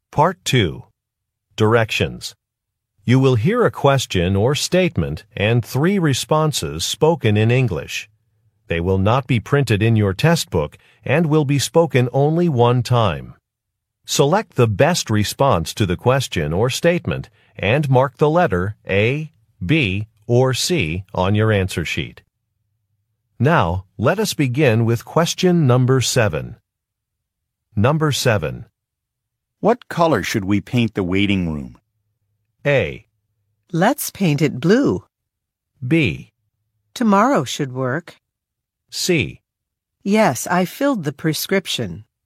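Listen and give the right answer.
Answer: Let's paint it blue.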